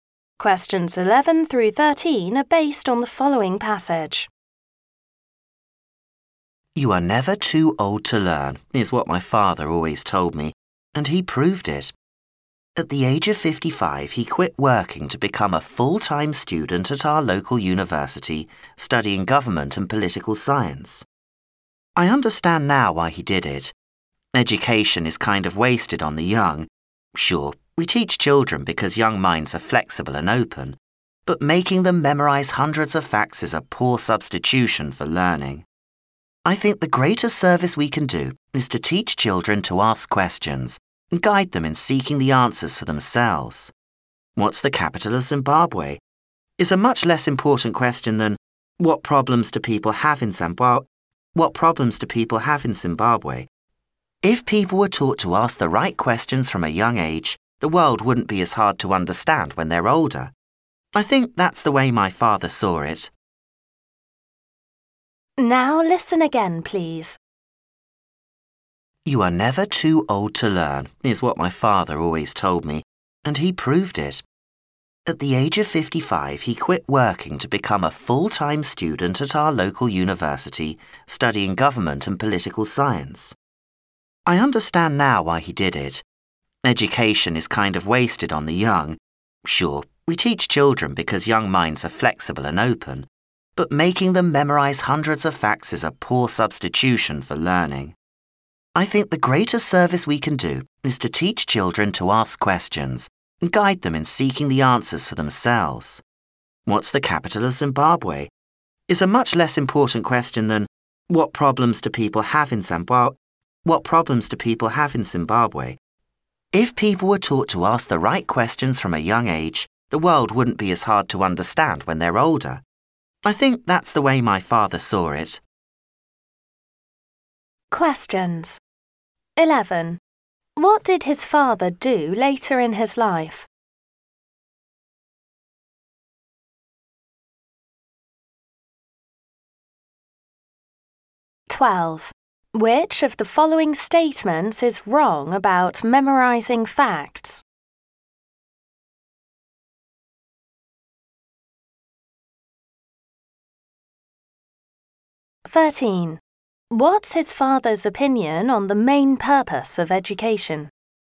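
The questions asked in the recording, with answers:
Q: What did his father do later in his life?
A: He quit working and became a full-time university student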